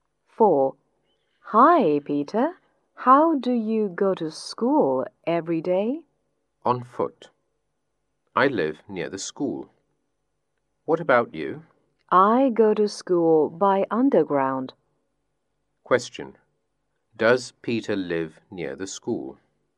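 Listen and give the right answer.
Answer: Yes, he does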